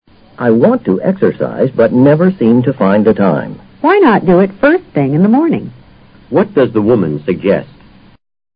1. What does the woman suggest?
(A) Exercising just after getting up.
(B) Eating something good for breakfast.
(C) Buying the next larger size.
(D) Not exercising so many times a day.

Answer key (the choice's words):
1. Exercising just after getting up.

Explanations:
to exercise = to do exercises。First thing是状语短语,作"at first moment"解。她的意思是"为什么不一起床就出去做操呢?"A与这个意思则相同的。